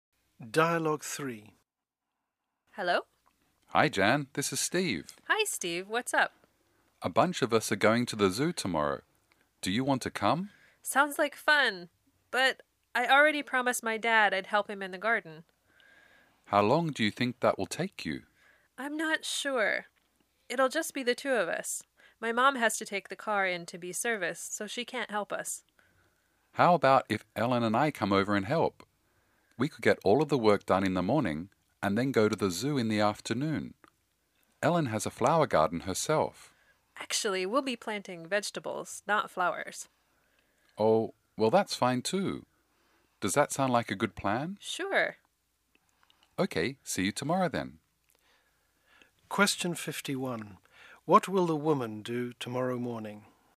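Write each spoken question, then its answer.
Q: What will the woman do tomorrow morning?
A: Help her dad plant vegetables in the garden (with Steve and Ellen)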